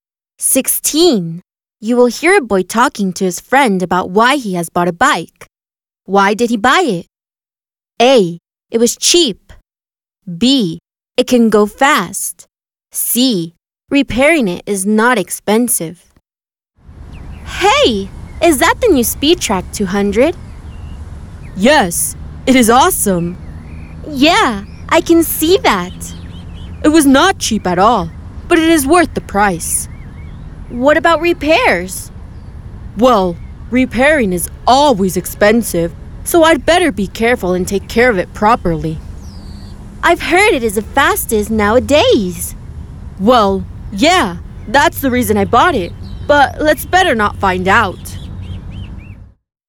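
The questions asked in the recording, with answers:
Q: Why did he buy it? A. It was cheap.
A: B: It can go fast.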